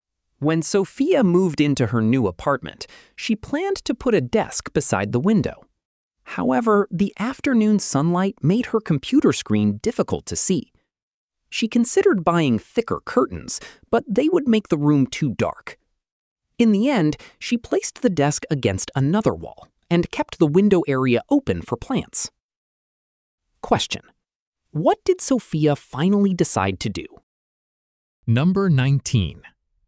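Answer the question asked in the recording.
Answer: Put the desk against another wall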